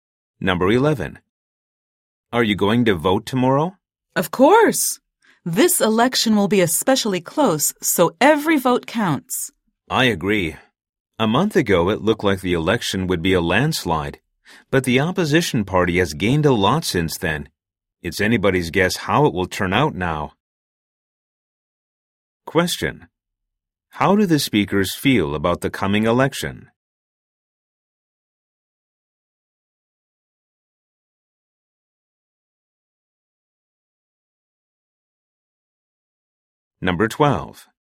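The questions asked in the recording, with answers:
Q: How do the speakers feel about the coming election?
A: It will be very close; the outcome is uncertain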